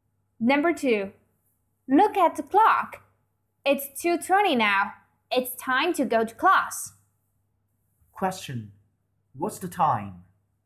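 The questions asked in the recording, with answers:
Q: What's the time?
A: It's 2:20.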